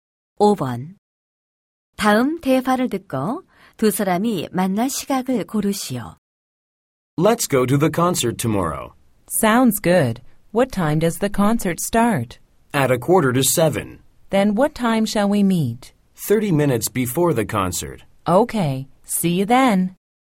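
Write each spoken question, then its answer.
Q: 다음 대화를 듣고 두 사람이 만날 시각을 고르시오.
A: 6:15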